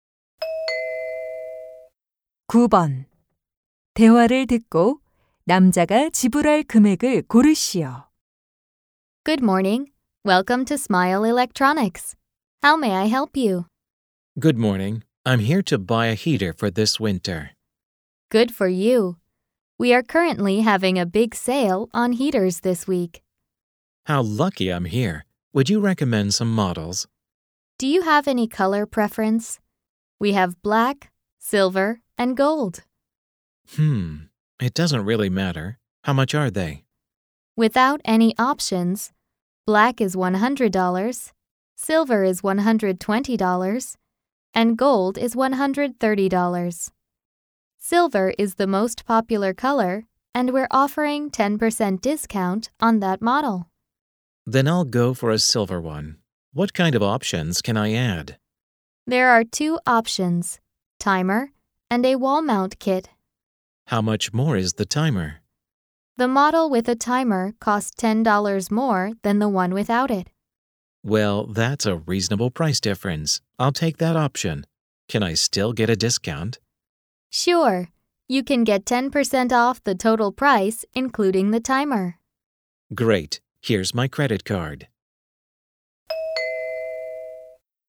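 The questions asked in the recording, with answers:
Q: 대화를 듣고 남자가 지불할 금액을 고르시오.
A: $117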